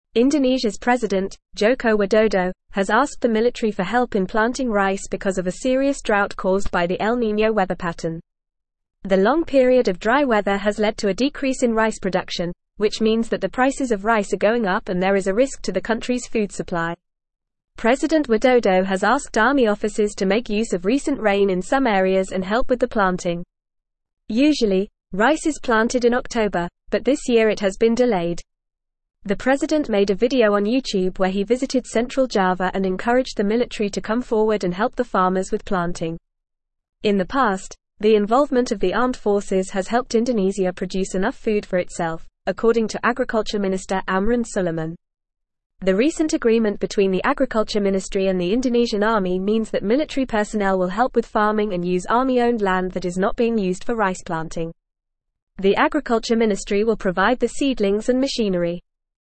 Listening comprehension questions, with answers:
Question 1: Indonesia's (1)______, Joko Widodo, has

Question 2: has (2)______ the military for help in planting rice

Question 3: caused by the El Niño (3)______ pattern.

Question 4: which means that the (4)______ of rice are going up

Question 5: there is a risk to the country's food (5)______.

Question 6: (6)______ Widodo has asked army officers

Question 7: to make use of (7)______ rain in some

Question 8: rain in some (8)______ and help with the planting.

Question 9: visited central Java and (9)______ the military to come forward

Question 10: In the past, the (10)______ of the armed forces has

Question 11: has (11)______ Indonesia produce enough food for itself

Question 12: according to Agriculture Minister (12)______ Sulaiman.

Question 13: The recent (13)______ between the agriculture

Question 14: between the agriculture (14)______ and the Indonesian army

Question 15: military personnel will help with (15)______ and use army-owned land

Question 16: The agriculture ministry will (16)______ the seedlings and machinery.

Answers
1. president
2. asked
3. weather
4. prices
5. supply
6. President
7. recent
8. areas
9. encouraged
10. involvement
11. helped
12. Amran
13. agreement
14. ministry
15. farming
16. provide

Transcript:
Indonesia's president, Joko Widodo, has asked the military for help in planting rice because of a serious drought caused by the El Niño weather pattern. The long period of dry weather has led to a decrease in rice production, which means that the prices of rice are going up and there is a risk to the country's food supply. President Widodo has asked army officers to make use of recent rain in some areas and help with the planting. Usually, rice is planted in October, but this year it has been delayed. The president made a video on YouTube where he visited central Java and encouraged the military to come forward and help the farmers with planting. In the past, the involvement of the armed forces has helped Indonesia produce enough food for itself, according to Agriculture Minister Amran Sulaiman. The recent agreement between the agriculture ministry and the Indonesian army means that military personnel will help with farming and use army-owned land that is not being used for rice planting. The agriculture ministry will provide the seedlings and machinery.

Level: Level 3